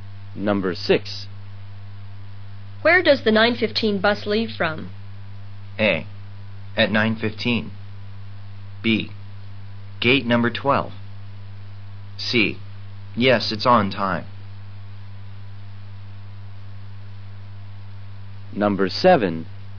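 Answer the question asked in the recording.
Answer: B: Gate number 12.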